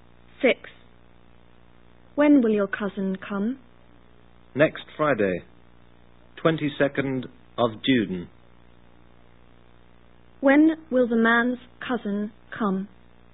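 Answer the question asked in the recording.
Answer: Next Friday, June 22nd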